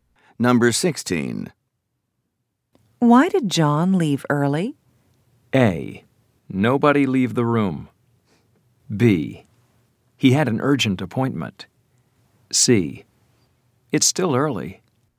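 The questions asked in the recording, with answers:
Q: Why did John leave early?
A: B: He had an urgent appointment.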